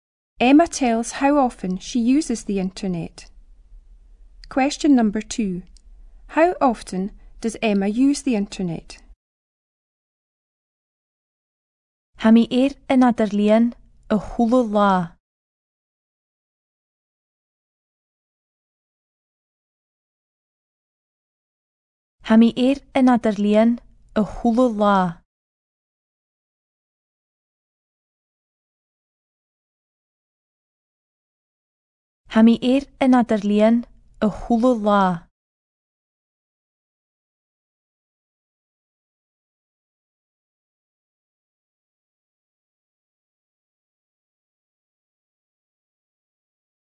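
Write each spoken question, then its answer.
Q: How often does Emma use the internet?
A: Every day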